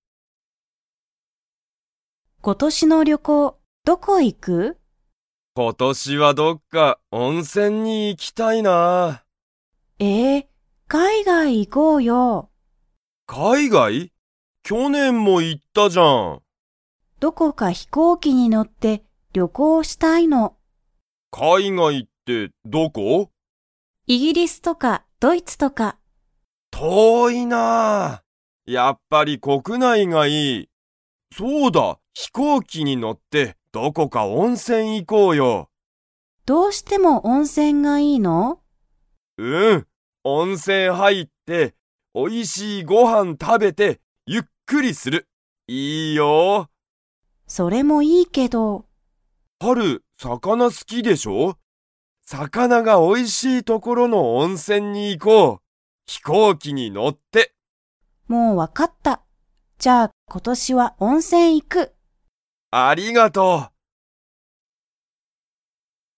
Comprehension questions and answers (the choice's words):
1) タカシは、どこに行いきたいですか?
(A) 海外かいがい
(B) 国内こくない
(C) イギリス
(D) ドイツ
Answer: 国内こくない

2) タカシとハルは、今年ことし海外かいがいに 。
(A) 行いく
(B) 行いかない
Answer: 行いかない

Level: Level 4